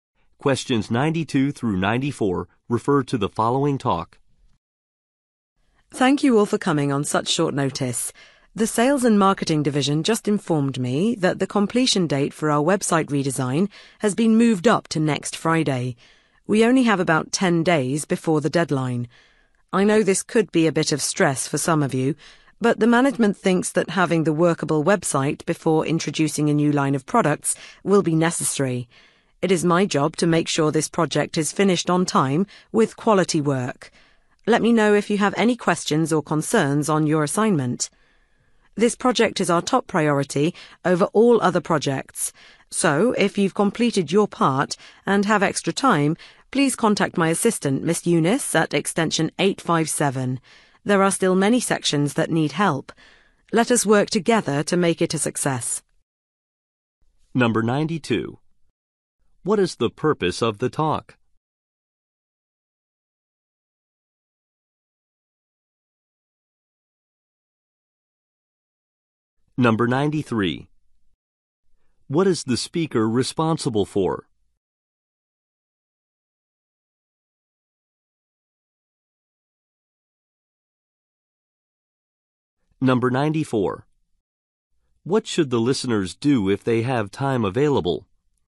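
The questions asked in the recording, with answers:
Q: What is the purpose of the talk?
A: To announce that the website redesign deadline has been moved up

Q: What is the speaker responsible for?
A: Making sure the project is finished on time

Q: What should the listeners do if they have time available?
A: Contact the speaker's assistant, Miss Eunice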